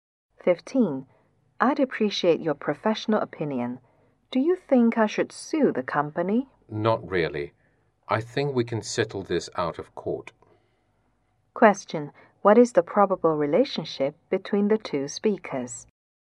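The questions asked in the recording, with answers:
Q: What is the probable relationship between the two speakers?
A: Lawyer and client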